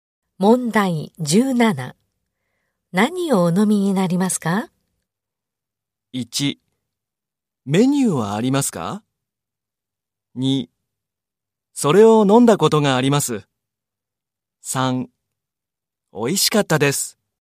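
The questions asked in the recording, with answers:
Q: 何をお飲みになりますか?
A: 1: メニューはありますか?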